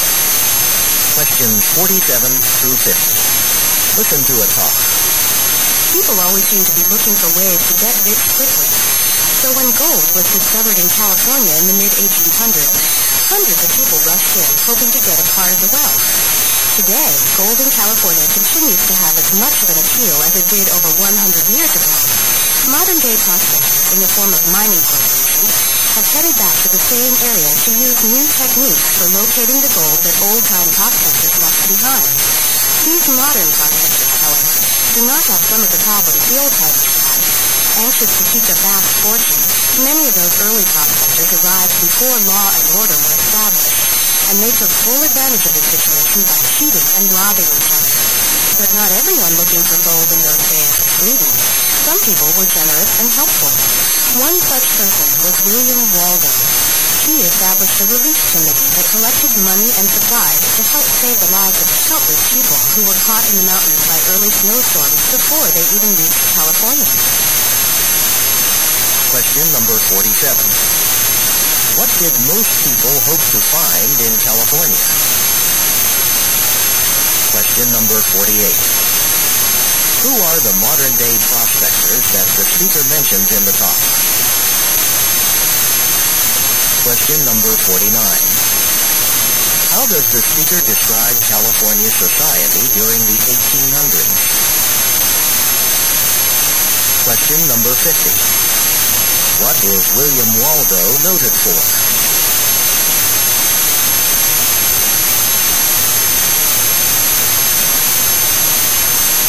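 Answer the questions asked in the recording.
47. Gold
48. Mining corporations
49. Lawless, with cheating and robbing
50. Setting up a relief committee to help people caught in snowstorms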